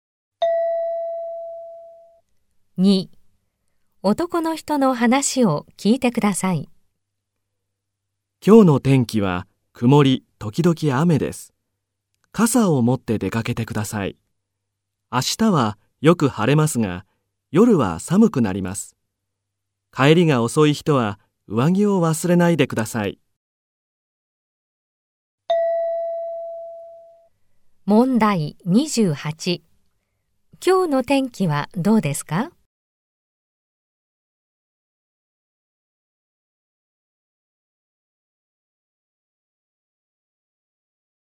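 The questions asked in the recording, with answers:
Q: 今日の天気はどうですか?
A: 曇り時々雨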